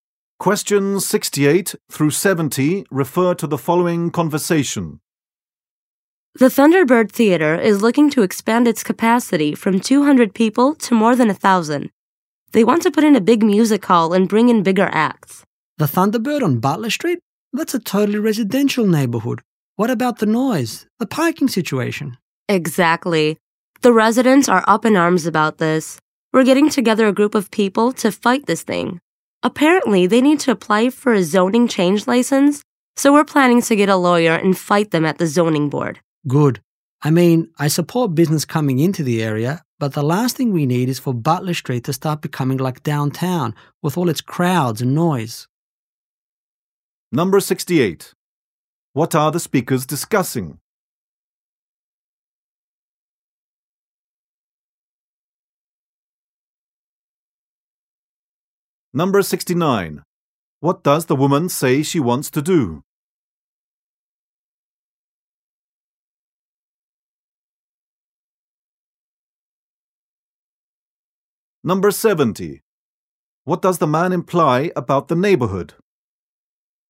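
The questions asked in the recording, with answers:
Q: What are the speakers discussing?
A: The Thunderbird Theater's plan to expand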